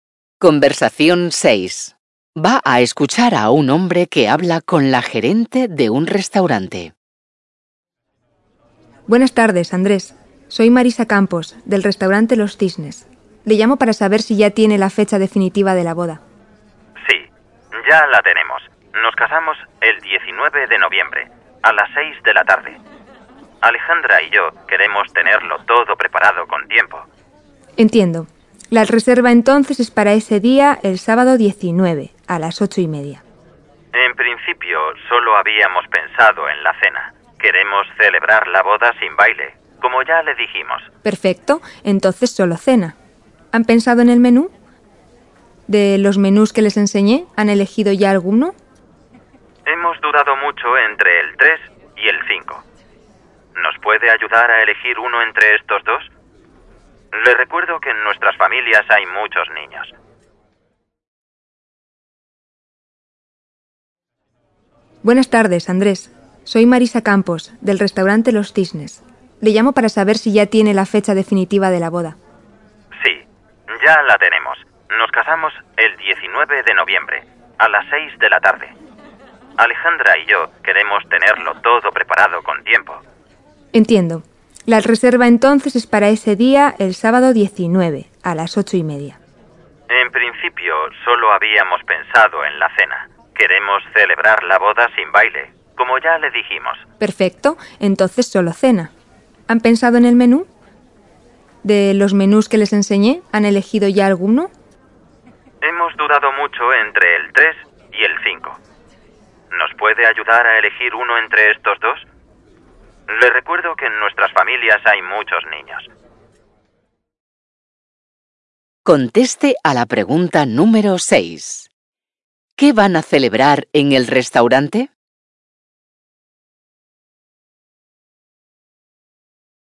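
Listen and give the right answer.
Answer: La cena de la boda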